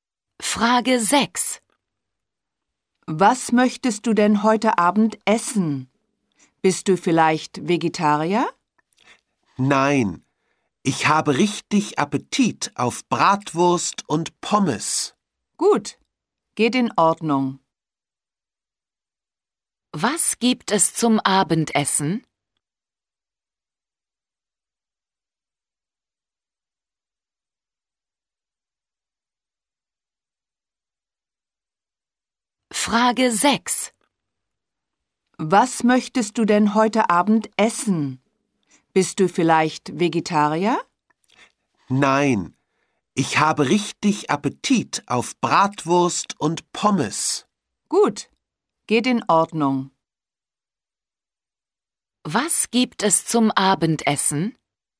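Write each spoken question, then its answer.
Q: Was gibt es zum Abendessen?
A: Bratwurst und Pommes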